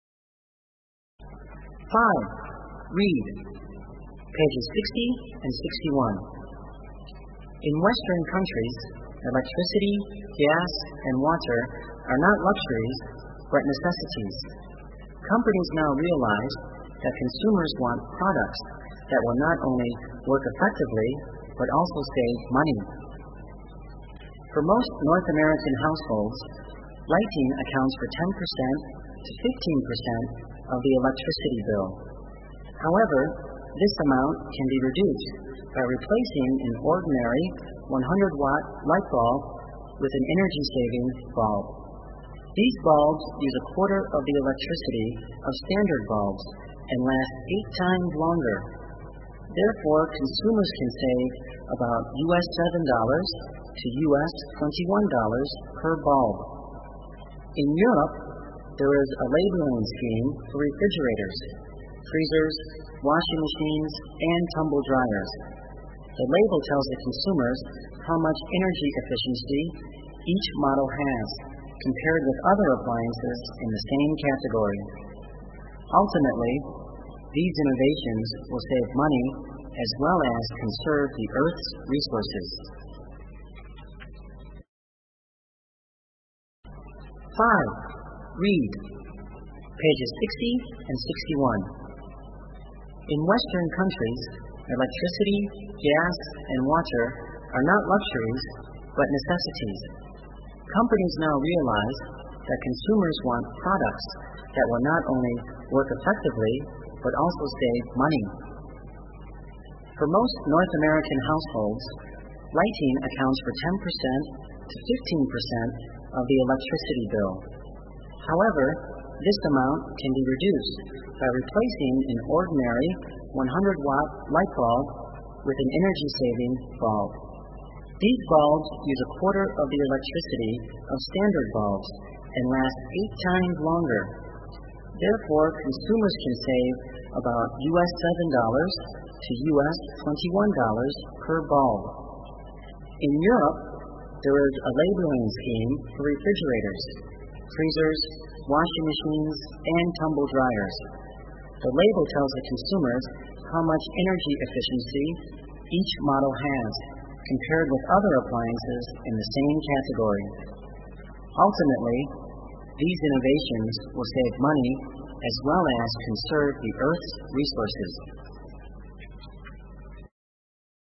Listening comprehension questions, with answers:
b) Answer the questions. Write the answers in your exercise book.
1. What are Western consumers interested in?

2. What can we do to spend less on lighting?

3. Mrs. Jones uses only two ordinary bulbs and she pays US$8 for lighting. How much will she pay if she uses two energy-saving bulbs instead?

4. What is the purpose of the labeling scheme?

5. Why should we save energy?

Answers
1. Western consumers are interested in both the quality and money-saving feature of the products.
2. To spend less on lighting, we can replace ordinary light bulbs with energy-saving bulbs.
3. Mrs. Jones will pay only US$2 for lighting.
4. The labeling scheme tells the consumers how much energy efficiency each model has.
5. We should save energy to save money as well as conserve the Earth's resources.

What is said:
In Western countries, electricity, gas, and water are not luxuries but necessities. Companies now realize that consumers want products that will not only work effectively but also save money.
For most North American households, lighting accounts for 10 percent to 15 percent of the electricity bill. However, this amount can be reduced by replacing an ordinary 100-watt light bulb with an energy-saving bulb. These bulbs use a quarter of the electricity of standard bulbs and last eight times longer. Therefore consumers can save about US\(7 to US\)21 per bulb.
In Europe, there is a labeling scheme for refrigerators, freezers, washing machines, and tumble dryers. The label tells the consumers how much energy efficiency each model has, compared with other appliances in the same category.
Ultimately, these innovations will save money as well as conserve the Earth's resources.

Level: Tiếng Anh 9